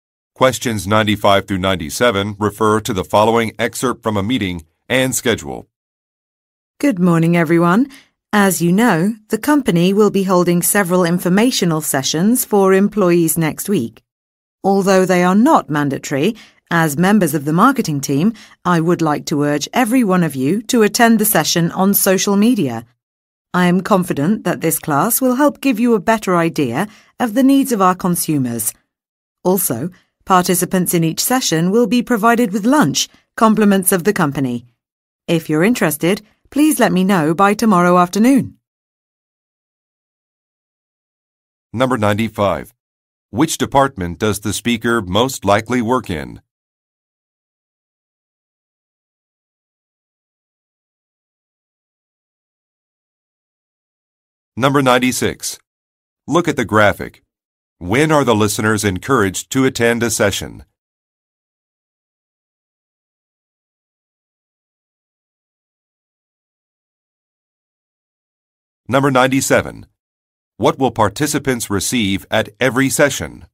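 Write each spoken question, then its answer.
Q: Which department does the speaker most likely work in?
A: Marketing

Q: What will participants receive at every session?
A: Lunch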